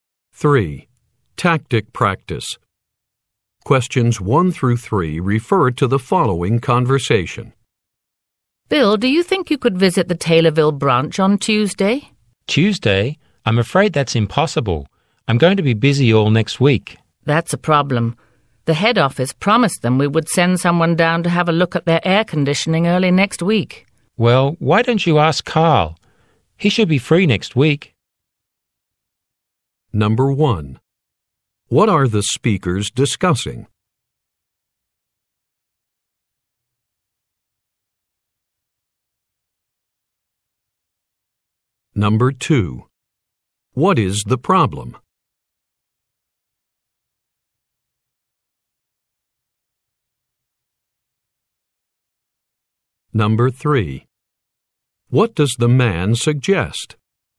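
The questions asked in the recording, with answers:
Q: What are the speakers discussing?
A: Sending someone to visit the Taylorville branch

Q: What is the problem?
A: Bill is busy all next week and can't visit on Tuesday

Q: What does the man suggest?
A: Asking Carl to go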